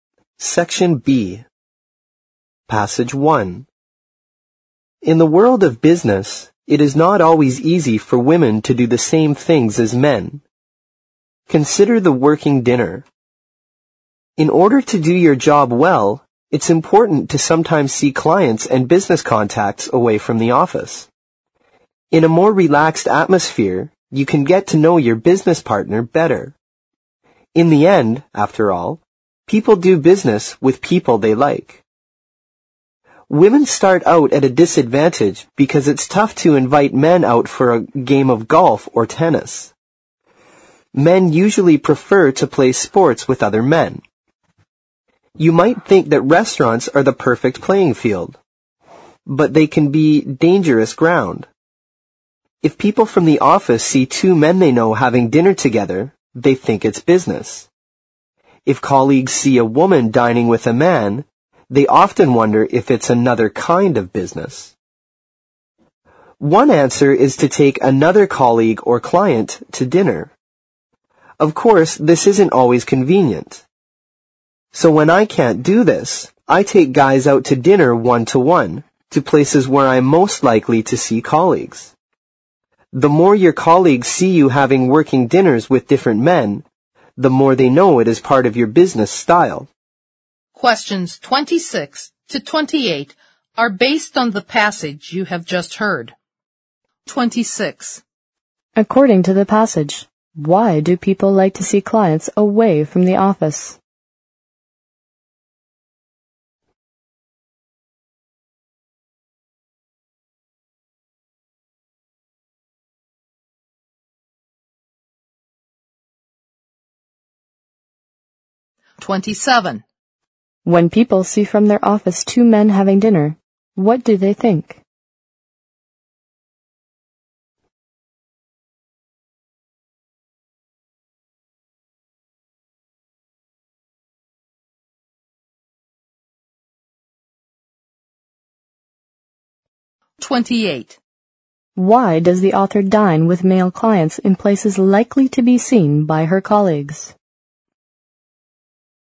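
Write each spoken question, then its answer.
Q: According to the passage, why do people like to see clients away from the office?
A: To get to know business partners better in a more relaxed atmosphere

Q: When people see from their office two men having dinner, what do they think?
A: They think it's business

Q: Why does the author dine with male clients in places likely to be seen by her colleagues?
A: So colleagues know working dinners with different men are part of her business style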